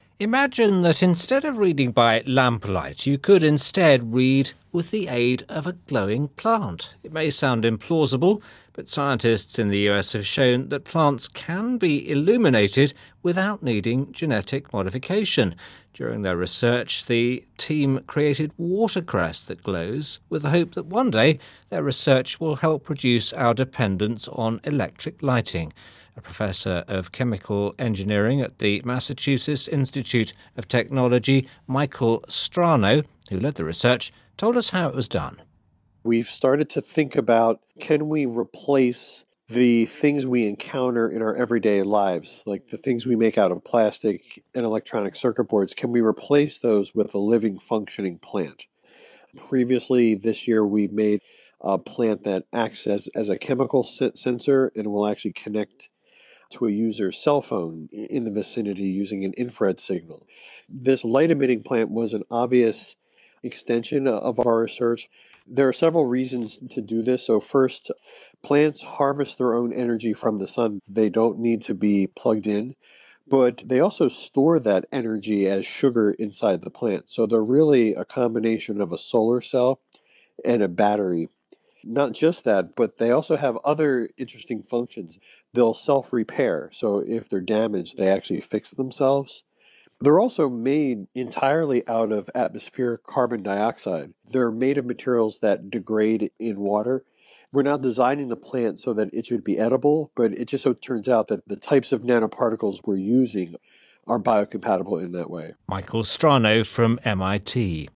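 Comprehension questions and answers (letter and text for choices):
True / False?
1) Plants are being made to produce light through genetic modification.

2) The scientist also developed a type of water that can produce light.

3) He mentions replacing plastic products and electronic circuit boards with plants.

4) The scientist has created a plant that can connect to a cellphone.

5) He has also created a plant that can be plugged in to an electrical outlet.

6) Plants store energy in the form of sugar.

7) He states that plants have the functions of both a solar cell and a battery.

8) He states that his plants will be difficult to replace if they are damaged.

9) Plants are made mainly of carbon monoxide.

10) The plants that he is creating were designed to be edible.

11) What is the discussion mainly about?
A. Watercress can be used for food or to produce light.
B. Research is being done to make plants that can be used as lights.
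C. A recent study has produced plants that can be used in computers and phones.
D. Scientists are now able to genetically modify plants to produce electricity.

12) Which of these statements is NOT true about the plants in the study.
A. The plants are edible.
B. The plants produce light.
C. The plants can store energy.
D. The plants have been genetically modified.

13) What is the purpose of the research that is being done?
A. To reduce people's dependency on electric lighting.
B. To make a more nutritious plant for salads.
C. To replace all electric lighting.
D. To combine plants with phones.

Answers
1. False
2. False
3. True
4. True
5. False
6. True
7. True
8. False
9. False
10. False
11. B. Research is being done to make plants that can be used as lights.
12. D. The plants have been genetically modified.
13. A. To reduce people's dependency on electric lighting.

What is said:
Imagine that instead of reading by lamplight, you could instead read with the aid of a glowing plant. 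It may sound implausible, but scientists in the U.S. have shown that plants can be illuminated without needing genetic modification.
During their research, the team created watercress that glows with the hope that one day their research will help reduce our dependence on electric lighting. A professor of chemical engineering at the Massachusetts Institute of Technology, Michael Strano, who led the research, told us how it was done.
We've started to think about can we replace the things we encounter in our everyday lives. Like the things we make out of plastic and electronic circuit boards, can we replace those with a living functioning plant.
Previously this year, we've made a plant that acts as a chemical sensor, and it will actually connect to a user's cellphone in the vicinity using an infrared signal. This light emitting plant was an obvious extension of our research.
There are several reasons to do this. 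So first, plants harvest their own energy from the sun. They don't need to be plugged in, but they also store that energy as sugar inside the plant. So they're really a combination of a solar cell and a battery.
Not just that, but they also have other interesting functions. They'll self-repair, so if they're damaged, they actually fix themselves.
They're also made entirely out of atmosphere carbon dioxide. They're made of materials that degrade in water. We are not designing the plants so that it would be edible, but it just so turns out that the types of nanoparticles that we are using are biocompatible in that way.
Michael Strano from MIT.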